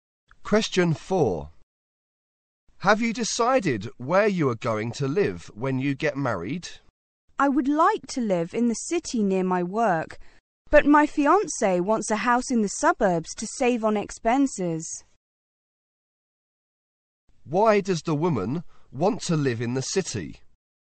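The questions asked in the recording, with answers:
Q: Why does the woman want to live in the city?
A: To be near her work.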